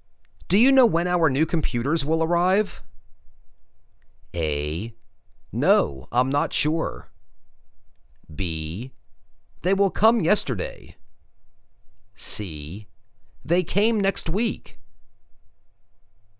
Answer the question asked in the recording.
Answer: No, I'm not sure.